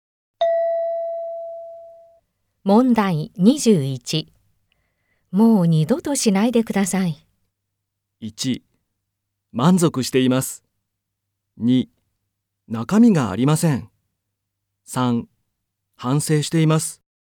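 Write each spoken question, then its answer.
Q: もう二度としないでください。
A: 3: 反省しています。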